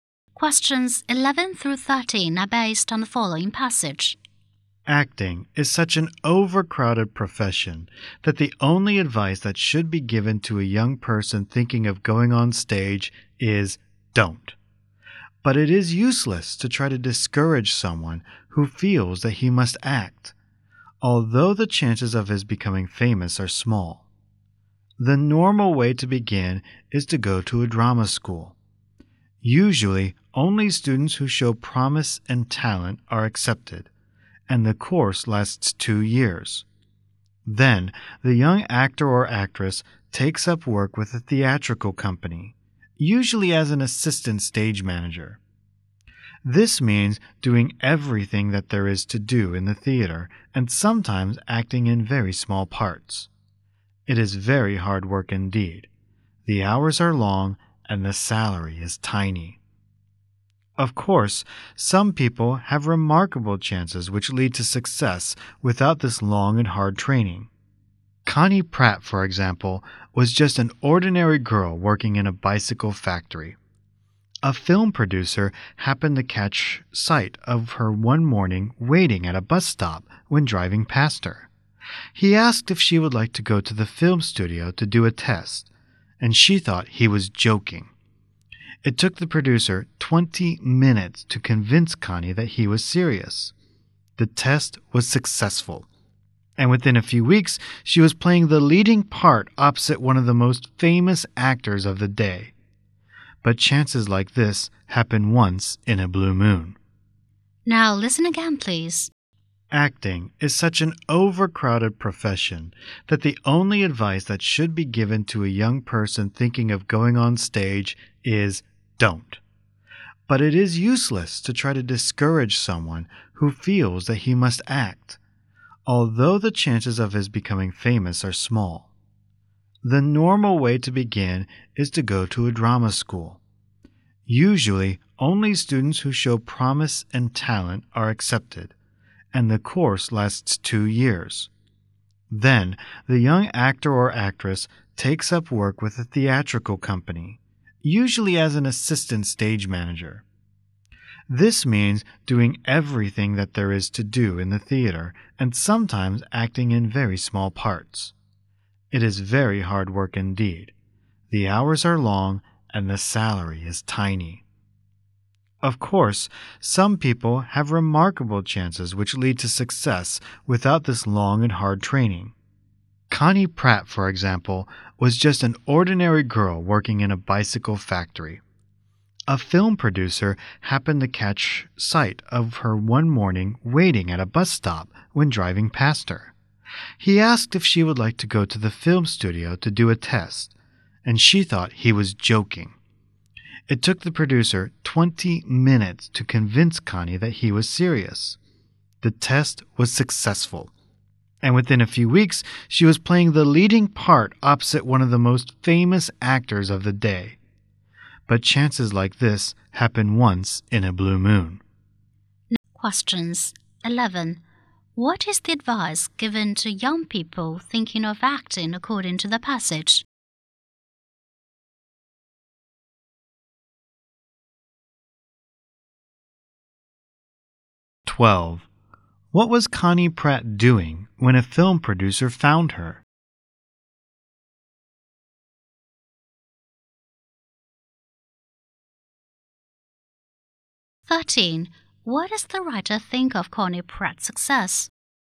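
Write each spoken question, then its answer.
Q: What is the advice given to young people thinking of acting according to the passage?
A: Don't go on stage.

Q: What was Connie Pratt doing when a film producer found her?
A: Waiting at a bus stop

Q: What does the writer think of Connie Pratt's success?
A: It was very rare luck.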